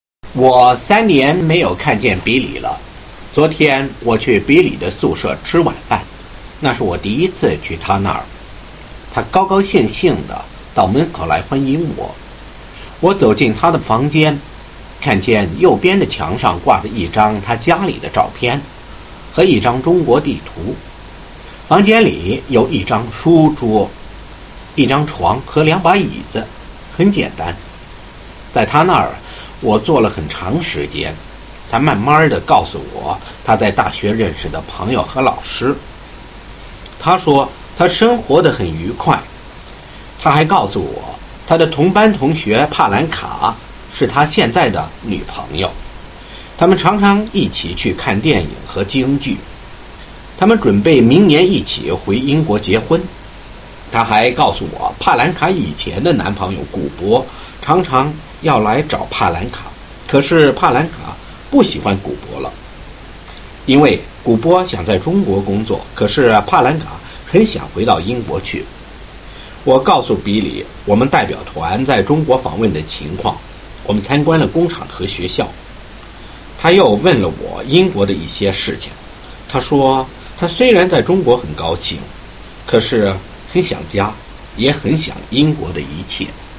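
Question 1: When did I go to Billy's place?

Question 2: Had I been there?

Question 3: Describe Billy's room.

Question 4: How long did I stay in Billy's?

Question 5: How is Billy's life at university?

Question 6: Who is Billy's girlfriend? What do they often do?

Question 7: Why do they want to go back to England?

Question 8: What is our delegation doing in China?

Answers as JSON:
{"1": "Yesterday, for dinner", "2": "No, it was the first time", "3": "Simple: a photo of his family and a map of China hang on the right wall; a desk, a bed and two chairs", "4": "A long time", "5": "Very happy", "6": "His classmate Palanka; they often go to films and Peking opera together", "7": "To get married next year", "8": "Visiting; they toured factories and schools"}

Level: First year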